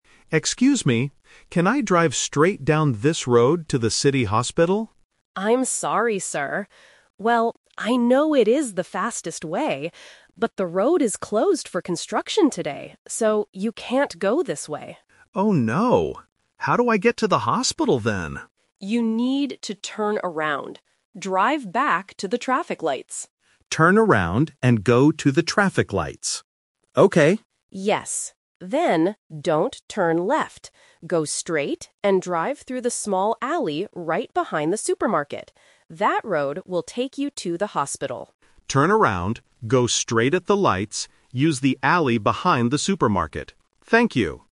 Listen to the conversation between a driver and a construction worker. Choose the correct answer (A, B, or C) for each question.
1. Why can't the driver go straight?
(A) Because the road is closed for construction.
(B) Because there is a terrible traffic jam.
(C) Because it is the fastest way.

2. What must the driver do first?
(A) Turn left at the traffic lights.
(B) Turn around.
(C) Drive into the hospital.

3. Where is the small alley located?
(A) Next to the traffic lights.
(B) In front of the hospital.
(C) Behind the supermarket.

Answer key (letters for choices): 1A, 2B, 3C

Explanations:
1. The Key: The worker explains the twist clearly: "...but the road is closed for construction today." The Trap: Option (C) is a trap. The worker mentions "it is the fastest way," but that is not the reason the road is blocked. Option (B) is a plausible real-life reason but is not mentioned in the audio.
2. The Key: The worker gives the first instruction: "You need to turn around." The Trap: Option (A) is explicitly warned against when the worker says, "don't turn left." Option (C) is the final destination, not the first step.
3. The Key: The worker tells the driver to use the "small alley right behind the supermarket." The Trap: Option (A) is a landmark the driver passes, but not where the alley is. Option (B) is a distractor because the alley leads to the hospital, but the audio specifies it is behind the supermarket.

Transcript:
Driver: Excuse me! Can I drive straight down this road to the city hospital?
Construction Worker: I'm sorry, sir. Well, I know it is the fastest way, but the road is closed for construction today. So, you can't go this way.
Driver: Oh no. How do I get to the hospital then?
Construction Worker: You need to turn around. Drive back to the traffic lights.
Driver: Turn around and go to the traffic lights. Okay.
Construction Worker: Yes. Then, don't turn left. Go straight and drive through the small alley right behind the supermarket. That road will take you to the hospital.
Driver: Turn around, go straight at the lights, use the alley behind the supermarket. Thank you!